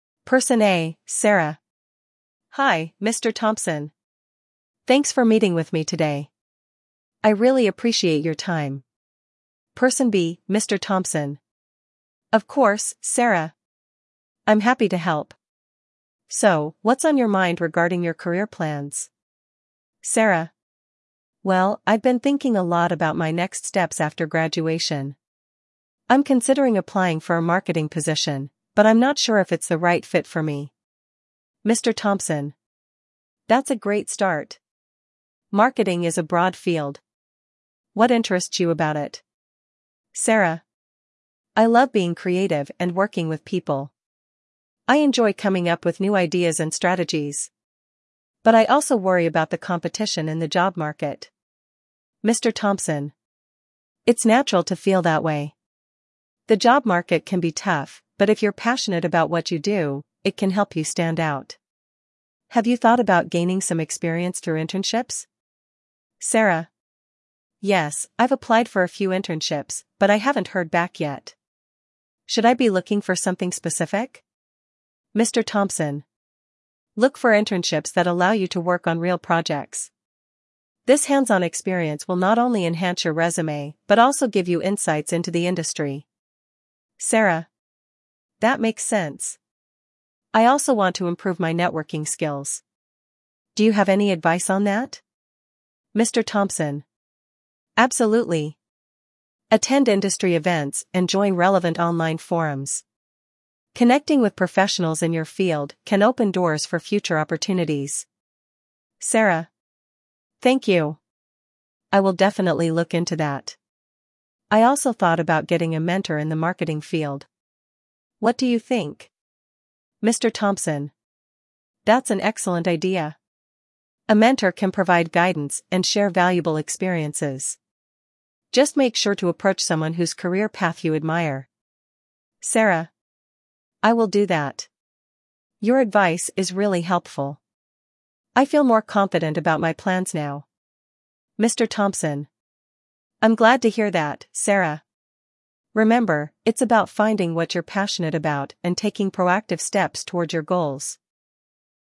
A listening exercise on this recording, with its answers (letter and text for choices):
In this listening activity, you will hear a conversation between a mentee and a mentor discussing career plans. After listening to the audio, you will answer 10 multiple-choice questions. Each question will have four answer options. Pay close attention to the details about the mentee's goals, the mentor's advice, and the suggestions made during the conversation.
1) What is Sarah considering after graduation?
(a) Pursuing further studies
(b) Applying for a marketing position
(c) Starting her own business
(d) Traveling abroad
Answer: (b) Applying for a marketing position

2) What does Sarah enjoy about marketing?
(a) The financial aspects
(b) Working independently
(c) Being creative and working with people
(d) The technical skills involved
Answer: (c) Being creative and working with people

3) What is Sarah worried about in her career?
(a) Not having enough qualifications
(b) The competition in the job market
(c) The salary in marketing positions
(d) Choosing the wrong field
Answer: (b) The competition in the job market

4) What does Mr. Thompson suggest Sarah do to stand out?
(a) Focus on her resume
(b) Gain experience through internships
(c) Take a break from her studies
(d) Write a blog about marketing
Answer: (b) Gain experience through internships

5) What should Sarah look for in internships?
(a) High-paying positions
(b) Opportunities to work on real projects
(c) Flexible hours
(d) Short duration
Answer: (b) Opportunities to work on real projects

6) How does Mr. Thompson suggest improving networking skills?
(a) Attending industry events and joining online forums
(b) Sending out mass emails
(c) Using social media exclusively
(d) Avoiding professional gatherings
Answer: (a) Attending industry events and joining online forums

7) What does Sarah think about finding a mentor?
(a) It's unnecessary.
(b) It's a good idea.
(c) It's too much work.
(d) It's only for experienced professionals.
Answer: (b) It's a good idea.

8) What is one quality Sarah should look for in a mentor?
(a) Someone with a similar background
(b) Someone whose career path she admires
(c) Someone who is a family friend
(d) Someone who has multiple degrees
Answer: (b) Someone whose career path she admires

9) How does Sarah feel at the end of the conversation?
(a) Confused and uncertain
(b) Overwhelmed by advice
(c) More confident about her plans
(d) Dismissive of the suggestions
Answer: (c) More confident about her plans

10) What is the overall message Mr. Thompson conveys to Sarah?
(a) Career choices are not important.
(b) Passion and proactive steps are key to success.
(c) Networking is overrated.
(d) Internships are a waste of time.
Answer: (b) Passion and proactive steps are key to success.

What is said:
[Person A: Sarah]
Hi, Mr. Thompson! Thanks for meeting with me today. I really appreciate your time.
[Person B: Mr. Thompson]
Of course, Sarah! I'm happy to help. So, what's on your mind regarding your career plans?
[Sarah]
Well, I've been thinking a lot about my next steps after graduation. I'm considering applying for a marketing position, but I'm not sure if it's the right fit for me.
[Mr. Thompson]
That's a great start! Marketing is a broad field. What interests you about it?
[Sarah]
I love being creative and working with people. I enjoy coming up with new ideas and strategies. But I also worry about the competition in the job market.
[Mr. Thompson]
It's natural to feel that way. The job market can be tough, but if you're passionate about what you do, it can help you stand out. Have you thought about gaining some experience through internships?
[Sarah]
Yes, I've applied for a few internships, but I haven't heard back yet. Should I be looking for something specific?
[Mr. Thompson]
Look for internships that allow you to work on real projects. This hands-on experience will not only enhance your resume but also give you insights into the industry.
[Sarah]
That makes sense! I also want to improve my networking skills. Do you have any advice on that?
[Mr. Thompson]
Absolutely! Attend industry events and join relevant online forums. Connecting with professionals in your field can open doors for future opportunities.
[Sarah]
Thank you! I will definitely look into that. I also thought about getting a mentor in the marketing field. What do you think?
[Mr. Thompson]
That's an excellent idea! A mentor can provide guidance and share valuable experiences. Just make sure to approach someone whose career path you admire.
[Sarah]
I will do that! Your advice is really helpful. I feel more confident about my plans now.
[Mr. Thompson]
I'm glad to hear that, Sarah! Remember, it's about finding what you're passionate about and taking proactive steps toward your goals.